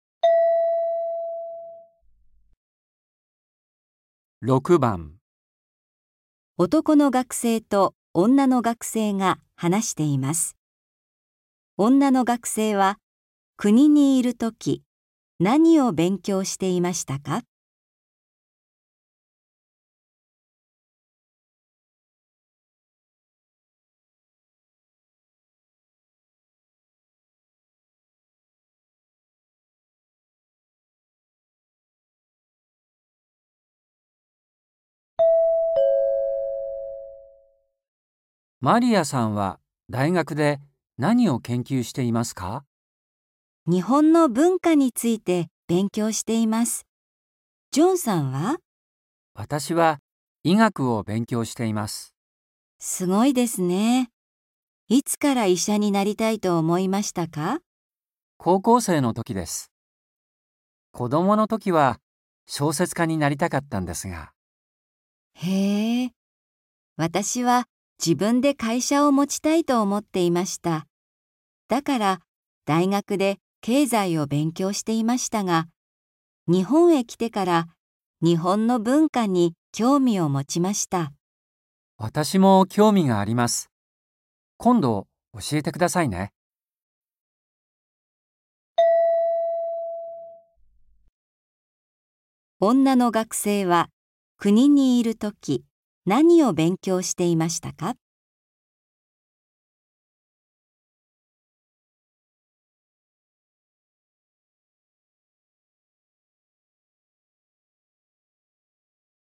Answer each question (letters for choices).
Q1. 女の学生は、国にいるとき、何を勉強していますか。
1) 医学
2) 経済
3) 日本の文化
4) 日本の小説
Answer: 2

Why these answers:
だから、大学で経済を勉強していましたが、日本へ来てから日本の文化に興味を持ちました。

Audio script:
M: マリアさんは大学で何を研究していますか。
F: 日本の文化について勉強しています。ジョンさんは?
M: 私は医学を勉強しています。
F: すごいですね。いつから医者になりたいと思いますか。
F: へえ。私は自分で会社を持ちたいと思っています。だから、大学で経済を勉強していましたが、日本へ来てから日本の文化に興味を持ちました。
M: 私も興味があります。今度教えてくださいね。

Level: 初級